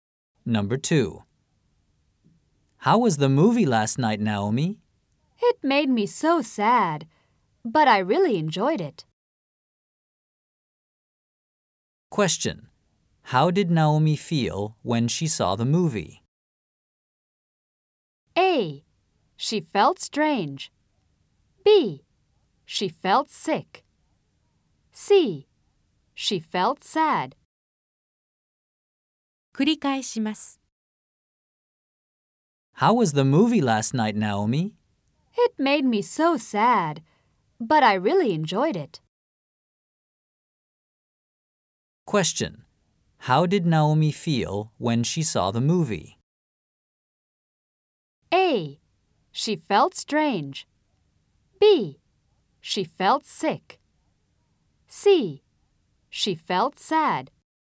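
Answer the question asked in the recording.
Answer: C: She felt sad.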